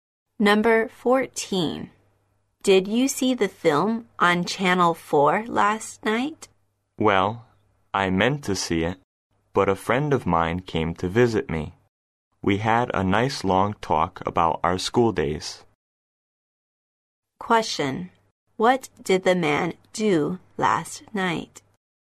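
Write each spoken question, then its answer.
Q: What did the man do last night?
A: He talked with a friend about their school days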